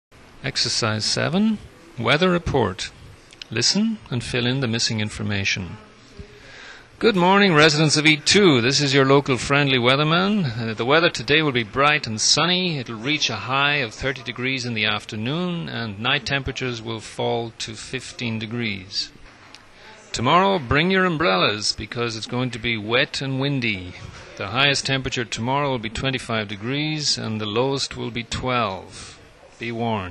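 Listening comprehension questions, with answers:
Ex. 7 - Weather Report. Listen and fill in the missing information.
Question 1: Weather conditions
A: Today: bright and sunny; Tomorrow: wet and windy

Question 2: Highest temperatures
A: Today: 30 degrees; Tomorrow: 25 degrees

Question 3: Lowest temperatures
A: Today: 15 degrees; Tomorrow: 12 degrees

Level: Book 2 – Unit 12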